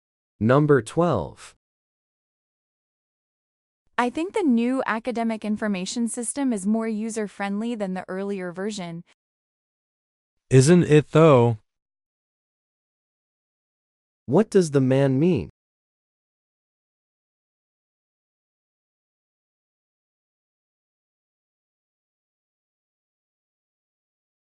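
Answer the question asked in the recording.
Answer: He agrees that the new system is more user-friendly.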